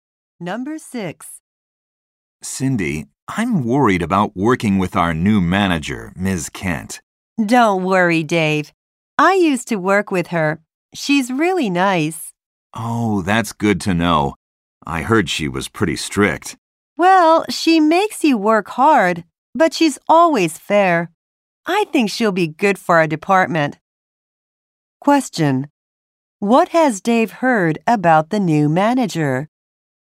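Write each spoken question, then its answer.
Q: What has Dave heard about the new manager?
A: She is pretty strict.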